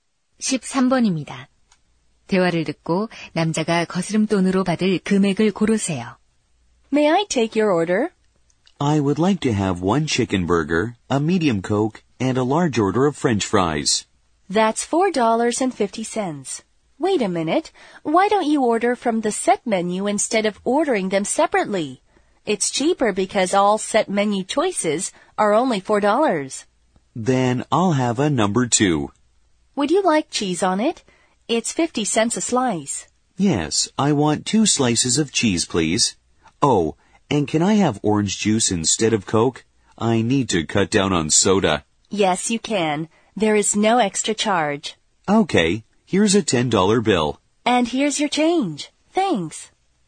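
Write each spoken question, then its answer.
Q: 대화를 듣고 남자가 거스름돈으로 받을 금액을 고르세요.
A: 5달러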